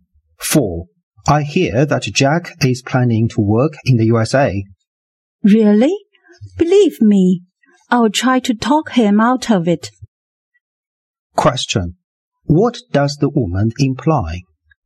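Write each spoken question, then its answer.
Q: What does the woman imply?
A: She will try to persuade Jack not to work in the USA.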